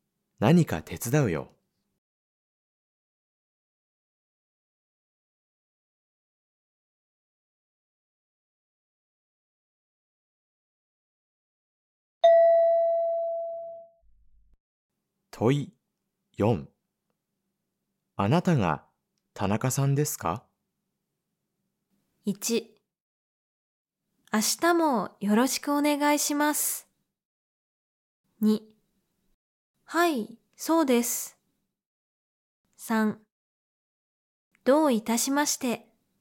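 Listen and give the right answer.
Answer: 2: はい、そうです。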